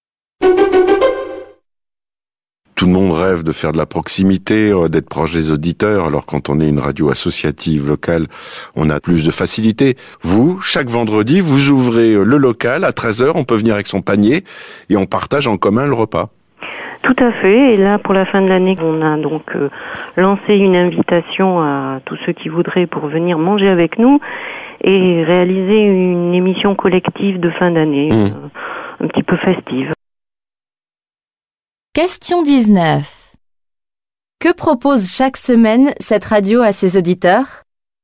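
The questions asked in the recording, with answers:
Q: Que propose chaque semaine cette radio à ses auditeurs?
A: Partager un repas en commun le vendredi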